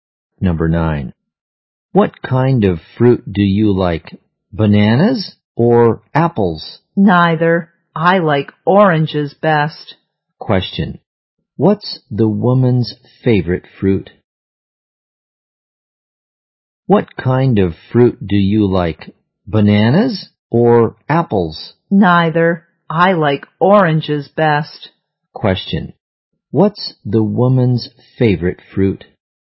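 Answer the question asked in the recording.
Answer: Oranges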